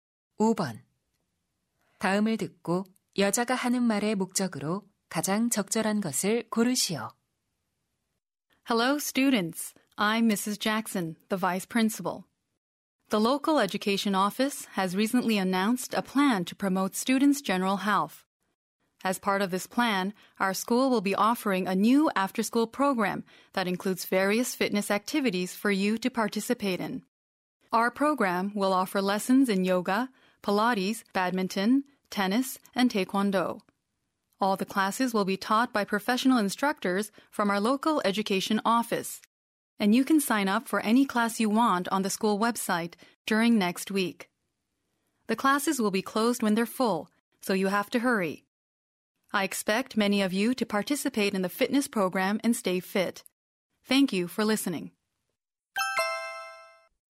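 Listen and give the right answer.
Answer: 새 방과 후 체력 증진 프로그램을 안내하려고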